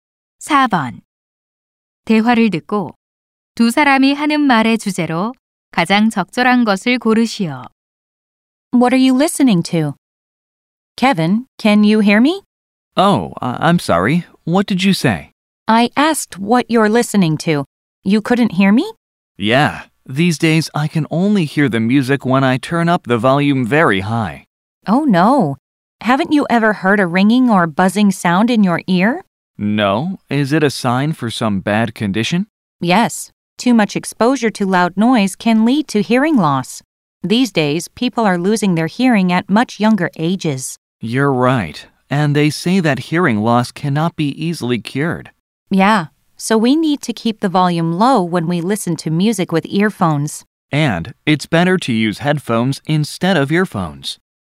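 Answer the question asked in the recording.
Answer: 큰 소리에 노출되어 생기는 청력 손실과 이를 예방하는 방법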